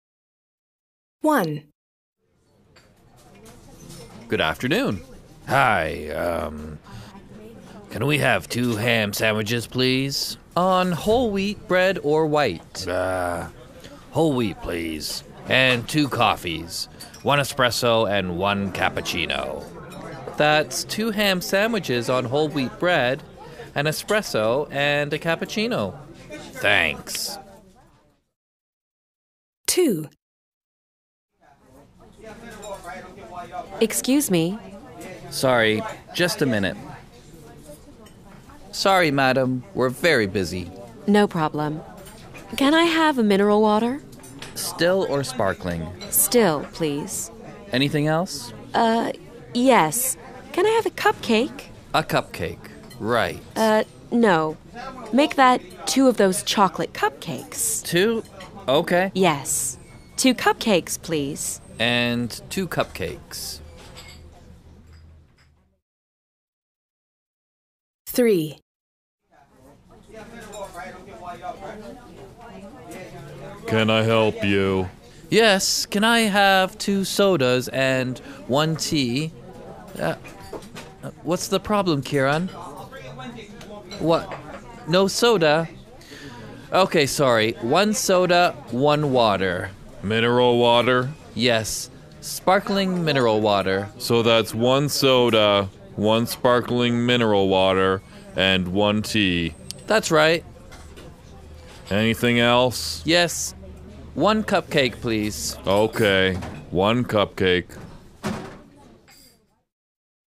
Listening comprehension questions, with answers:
A. Listen and complete the orders.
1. 2...ham... sandwiches, ............... bread, 1 espresso, 1............... .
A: whole wheat, cappuccino

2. 1 mineral water (...............) ............... cupcakes.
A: still, two (chocolate)